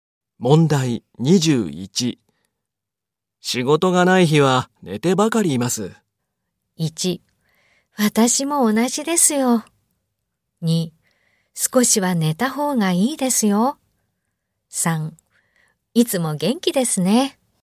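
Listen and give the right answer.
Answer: 1: 私も同じですよ。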